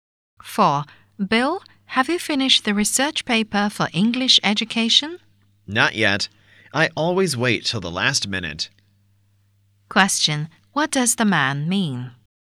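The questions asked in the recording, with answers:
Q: What does the man mean?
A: He hasn't finished the paper; he always leaves things to the last minute.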